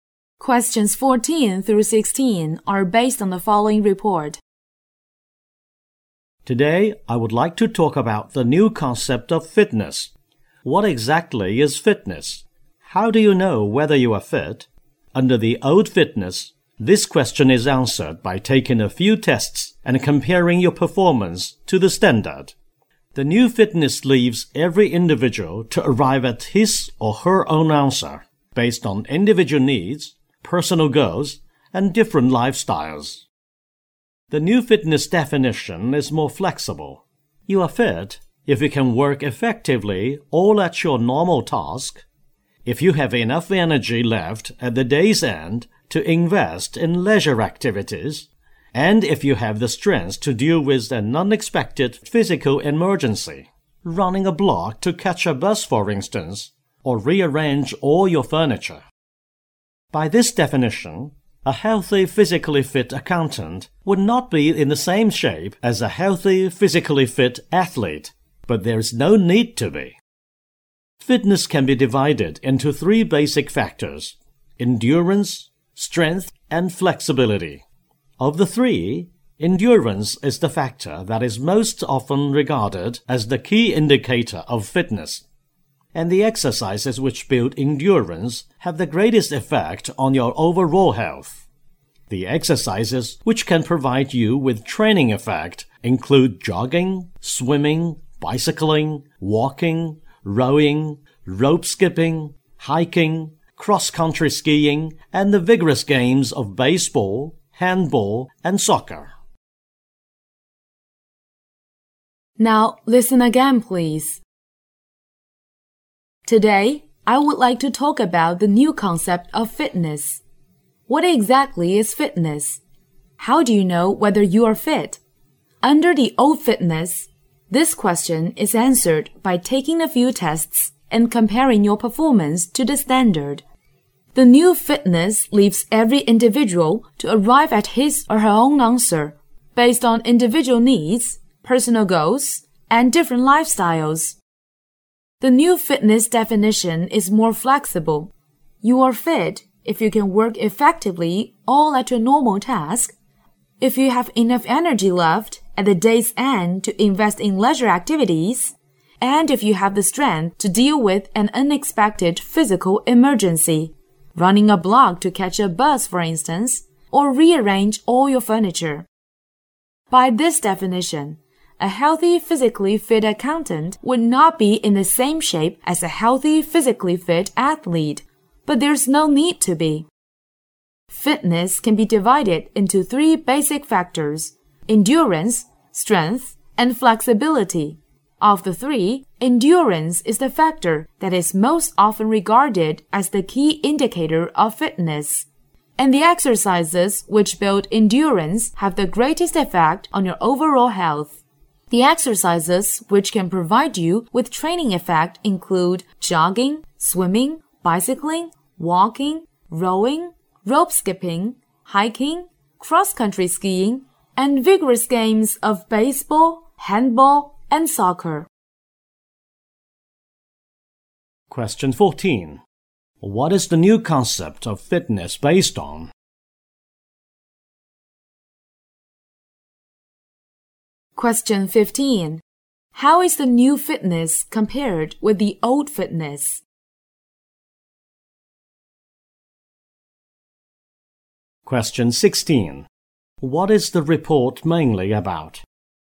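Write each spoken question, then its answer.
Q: What is the new concept of fitness based on?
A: Individual needs, personal goals and different lifestyles

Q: How is the new fitness compared with the old fitness?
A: More flexible

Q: What is the report mainly about?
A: The new concept of fitness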